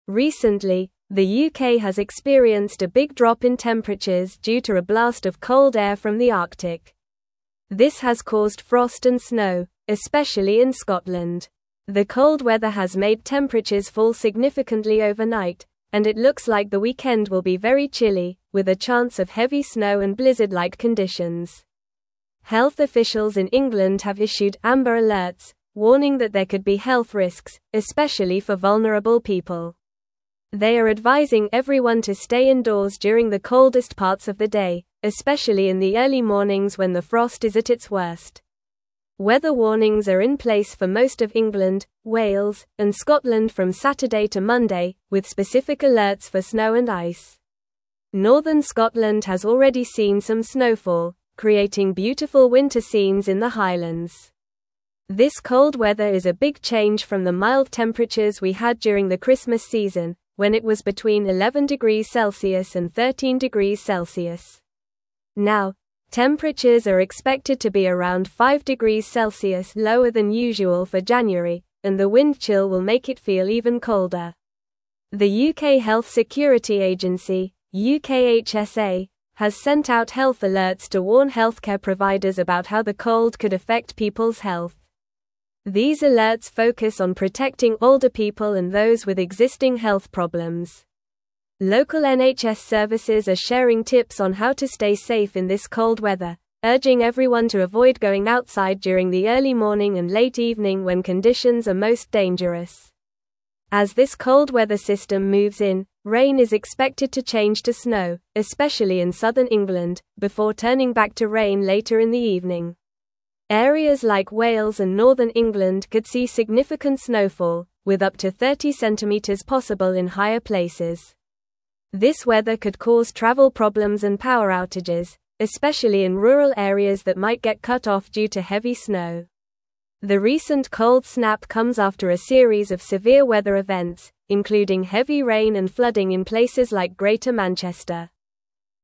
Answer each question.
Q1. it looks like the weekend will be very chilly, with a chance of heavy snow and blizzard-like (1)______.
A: conditions

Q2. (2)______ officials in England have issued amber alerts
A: Health

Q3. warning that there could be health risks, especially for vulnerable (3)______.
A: people

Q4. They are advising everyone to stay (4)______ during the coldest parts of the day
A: indoors

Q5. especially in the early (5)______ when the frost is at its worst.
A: mornings

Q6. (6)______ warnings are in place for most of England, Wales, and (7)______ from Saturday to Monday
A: Weather

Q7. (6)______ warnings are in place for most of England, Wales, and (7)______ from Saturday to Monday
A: Scotland

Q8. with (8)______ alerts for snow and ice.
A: specific

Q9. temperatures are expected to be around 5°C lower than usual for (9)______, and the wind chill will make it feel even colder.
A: January

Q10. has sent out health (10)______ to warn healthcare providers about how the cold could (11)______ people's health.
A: alerts

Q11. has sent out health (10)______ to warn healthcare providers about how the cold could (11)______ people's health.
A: affect

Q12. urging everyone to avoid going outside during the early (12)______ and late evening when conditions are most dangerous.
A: morning

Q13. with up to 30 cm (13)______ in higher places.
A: possible

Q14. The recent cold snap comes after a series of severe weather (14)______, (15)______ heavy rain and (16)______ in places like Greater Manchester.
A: events

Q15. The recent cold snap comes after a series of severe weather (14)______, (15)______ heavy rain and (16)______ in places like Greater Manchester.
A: including

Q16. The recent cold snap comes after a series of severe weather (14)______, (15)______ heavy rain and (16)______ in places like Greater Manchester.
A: flooding

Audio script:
Recently, the UK has experienced a big drop in temperatures due to a blast of cold air from the Arctic. This has caused frost and snow, especially in Scotland. The cold weather has made temperatures fall significantly overnight, and it looks like the weekend will be very chilly, with a chance of heavy snow and blizzard-like conditions. Health officials in England have issued amber alerts, warning that there could be health risks, especially for vulnerable people. They are advising everyone to stay indoors during the coldest parts of the day, especially in the early mornings when the frost is at its worst.
Weather warnings are in place for most of England, Wales, and Scotland from Saturday to Monday, with specific alerts for snow and ice. Northern Scotland has already seen some snowfall, creating beautiful winter scenes in the Highlands. This cold weather is a big change from the mild temperatures we had during the Christmas season, when it was between 11°C and 13°C. Now, temperatures are expected to be around 5°C lower than usual for January, and the wind chill will make it feel even colder.
The UK Health Security Agency (UKHSA) has sent out health alerts to warn healthcare providers about how the cold could affect people's health. These alerts focus on protecting older people and those with existing health problems. Local NHS services are sharing tips on how to stay safe in this cold weather, urging everyone to avoid going outside during the early morning and late evening when conditions are most dangerous.
As this cold weather system moves in, rain is expected to change to snow, especially in southern England, before turning back to rain later in the evening. Areas like Wales and northern England could see significant snowfall, with up to 30 cm possible in higher places. This weather could cause travel problems and power outages, especially in rural areas that might get cut off due to heavy snow. The recent cold snap comes after a series of severe weather events, including heavy rain and flooding in places like Greater Manchester.

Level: Level 3